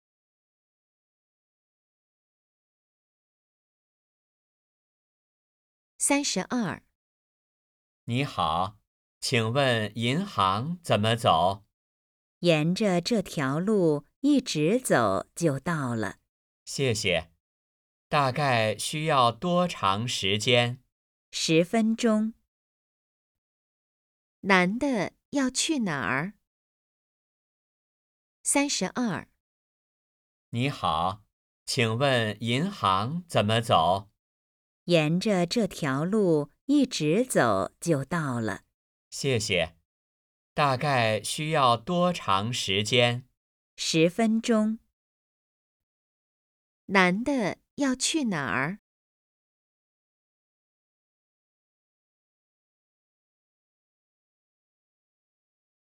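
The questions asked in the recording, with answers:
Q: 男的要去哪儿?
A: 银行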